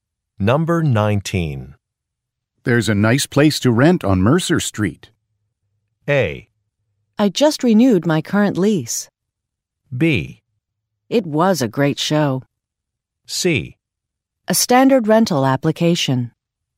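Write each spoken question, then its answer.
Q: There's a nice place to rent on Mercer Street.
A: A: I just renewed my current lease.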